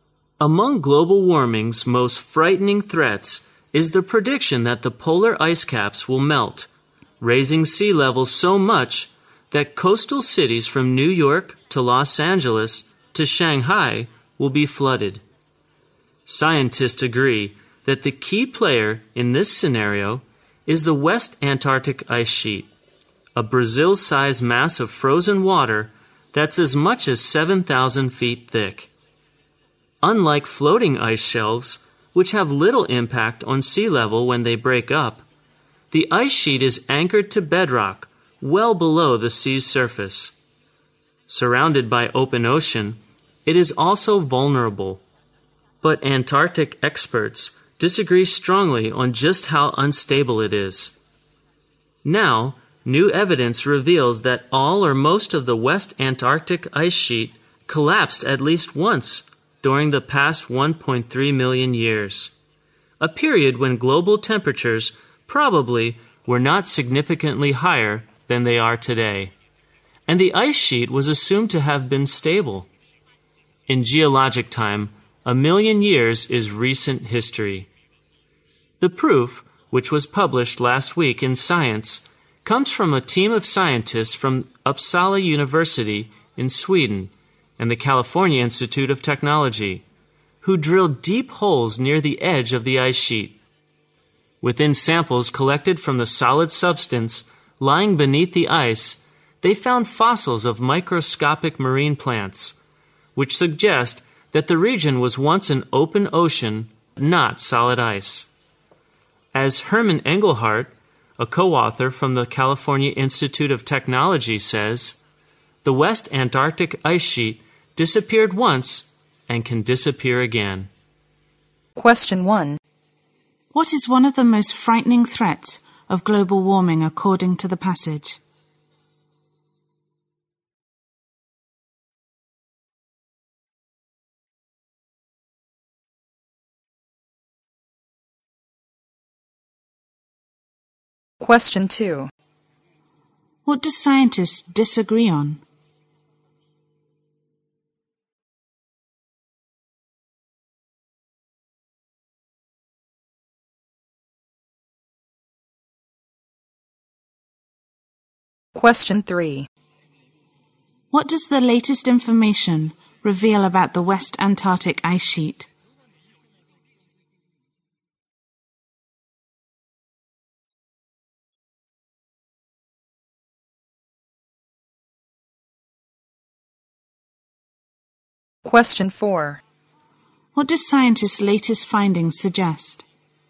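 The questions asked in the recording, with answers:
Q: What is one of the most frightening threats of global warming according to the passage?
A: Polar ice caps melt and sea levels rise, flooding coastal cities

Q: What do scientists disagree on?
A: How unstable the West Antarctic Ice Sheet is

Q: What does the latest information reveal about the West Antarctic ice sheet?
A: It collapsed at least once in the past 1.3 million years

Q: What do scientists' latest findings suggest?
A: The ice sheet could disappear again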